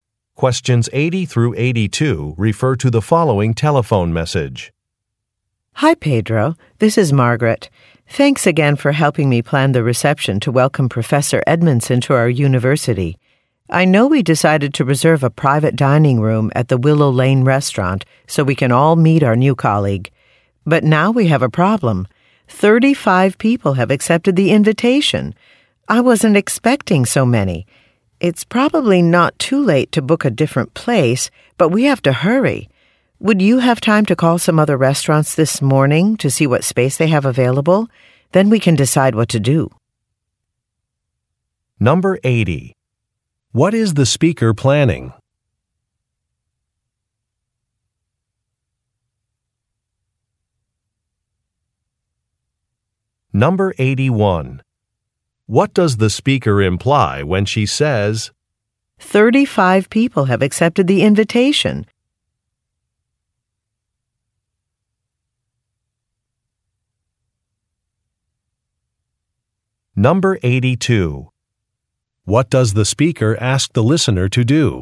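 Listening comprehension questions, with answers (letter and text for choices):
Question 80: What is the speaker planning?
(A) A fund-raising party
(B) A welcome reception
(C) An award ceremony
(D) An annual picnic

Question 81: What does the speaker imply when she says, "35 people have accepted the invitation"?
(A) She thinks changing a date would be difficult.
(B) She forgot to notify some people about an event.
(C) The current venue is too small.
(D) A ticket price is too high.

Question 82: What does the speaker ask the listener to do?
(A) Update a database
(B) Prepare some name tags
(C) Help select a speaker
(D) Make some phone calls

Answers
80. (B) A welcome reception
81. (C) The current venue is too small.
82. (D) Make some phone calls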